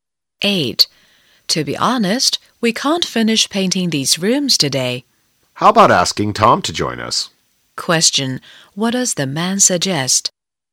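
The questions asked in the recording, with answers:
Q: What does the man suggest?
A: Asking Tom to help paint the rooms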